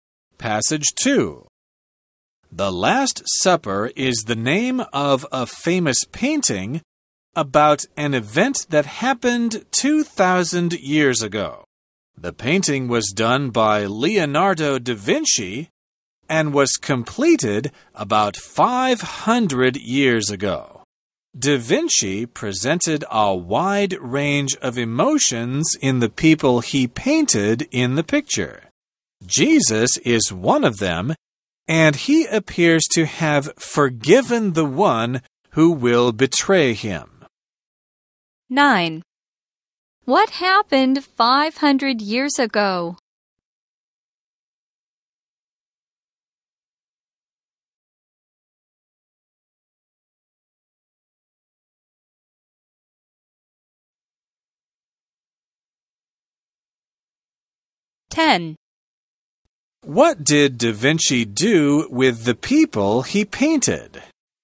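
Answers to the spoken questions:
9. The painting The Last Supper was completed
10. He presented a wide range of emotions in them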